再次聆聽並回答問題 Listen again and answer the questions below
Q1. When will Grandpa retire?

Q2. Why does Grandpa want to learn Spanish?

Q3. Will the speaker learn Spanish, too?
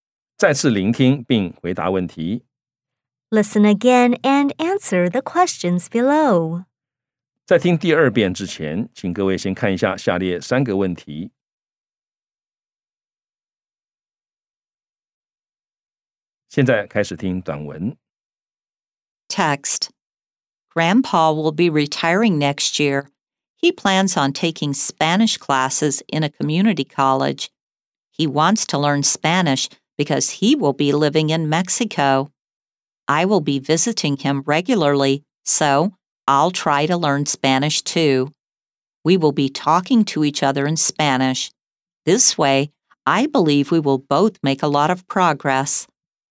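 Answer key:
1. Next year.
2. Because he will be living in Mexico.
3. Yes, the speaker will try to learn Spanish too.

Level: 中階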